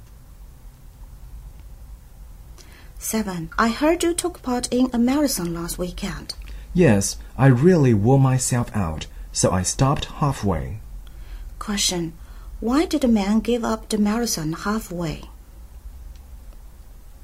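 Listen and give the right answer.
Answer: He was exhausted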